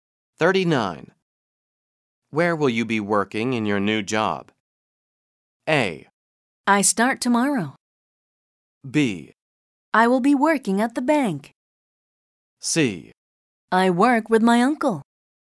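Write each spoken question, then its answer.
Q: Where will you be working in your new job?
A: B: I will be working at the bank.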